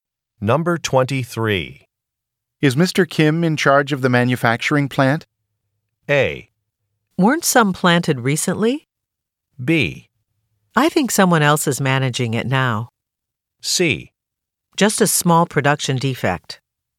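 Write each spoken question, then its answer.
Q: Is Mr. Kim in charge of the manufacturing plant?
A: B: I think someone else is managing it now.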